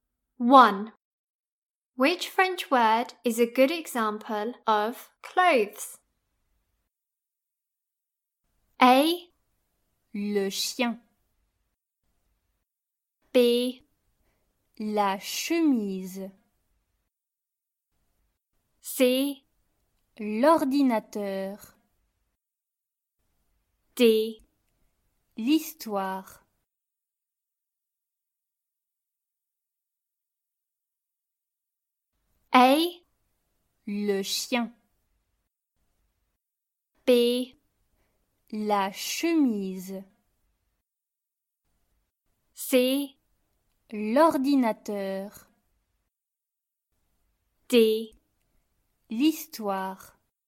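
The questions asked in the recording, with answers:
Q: Which French word is a good example of clothes?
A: B: La chemise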